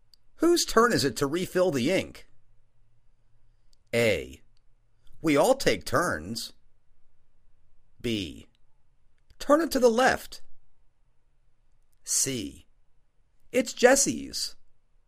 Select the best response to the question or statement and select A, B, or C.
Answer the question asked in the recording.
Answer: It's Jessie's.